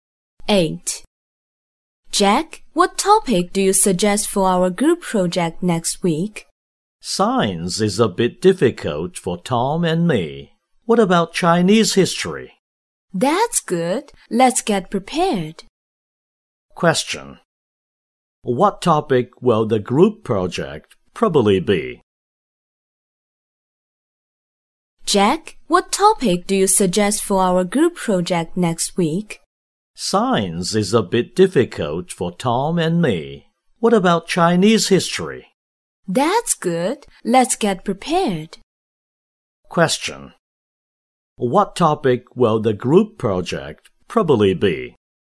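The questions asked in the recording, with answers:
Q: What topic will the group project probably be?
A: Chinese history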